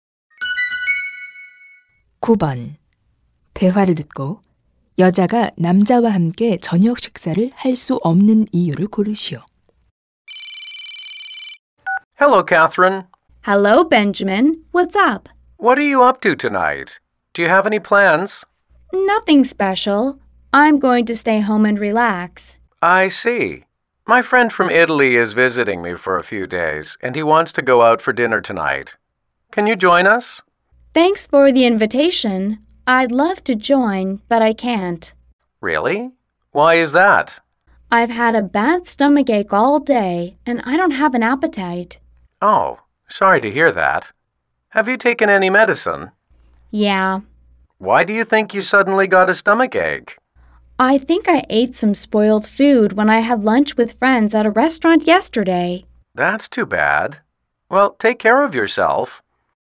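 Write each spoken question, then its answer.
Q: 대화를 듣고 여자가 남자와 함께 저녁 식사를 할 수 없는 이유를 고르시오.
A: 배탈이 나서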